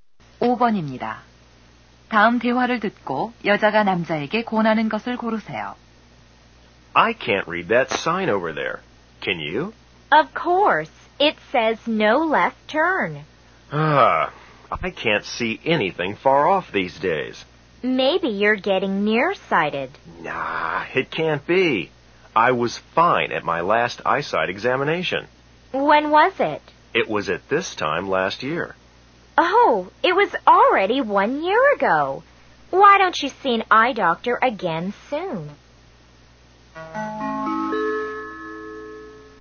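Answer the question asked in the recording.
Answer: 안과에 가 보기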